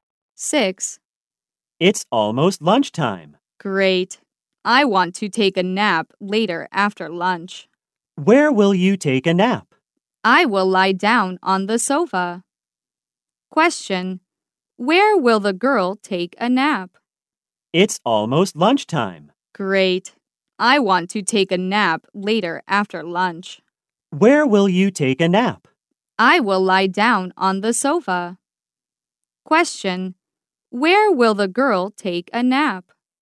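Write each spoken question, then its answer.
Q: Question. Where will the girl take a nap?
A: On the sofa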